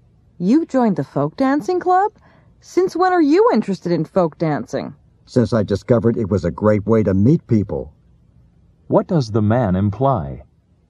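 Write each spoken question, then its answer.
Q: What does the man imply?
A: He joined the club because folk dancing is a good way to meet people.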